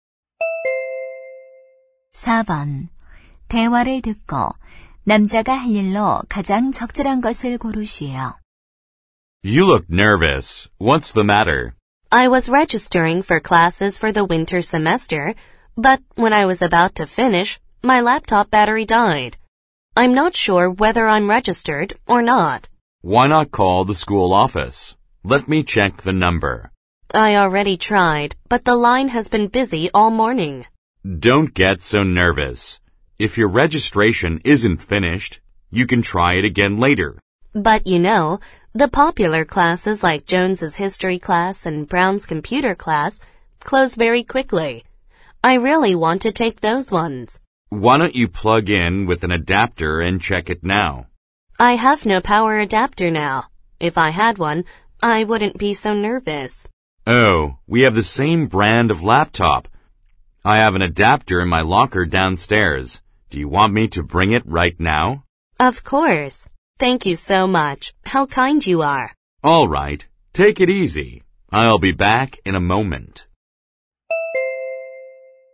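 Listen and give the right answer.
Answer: 사물함에서 노트북 전원 어댑터를 가져다주기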